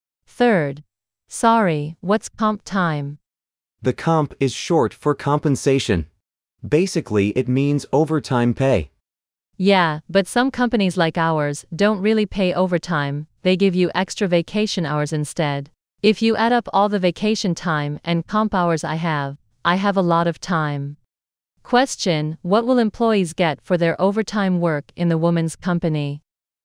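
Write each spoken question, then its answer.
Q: What will employees get for their overtime work in the woman's company?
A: Extra vacation hours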